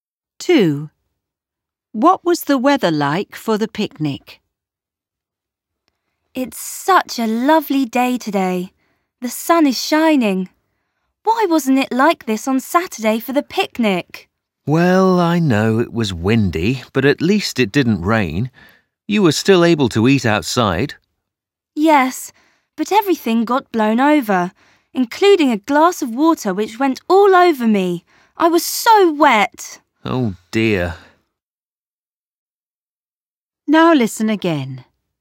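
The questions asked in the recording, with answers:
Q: What was the weather like for the picnic?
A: Windy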